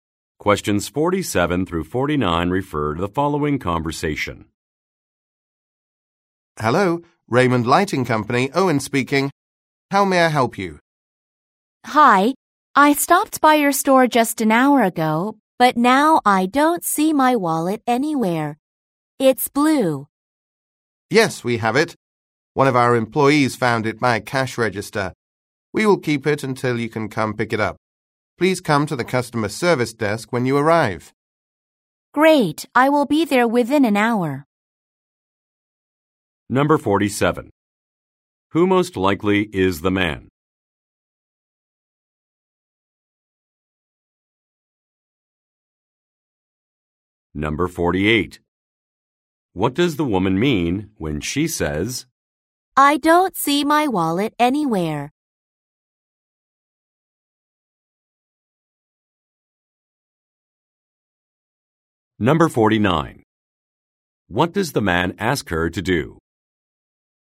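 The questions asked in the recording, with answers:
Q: Who most likely is the man?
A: A store employee

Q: What does the man ask her to do?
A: Come to the customer service desk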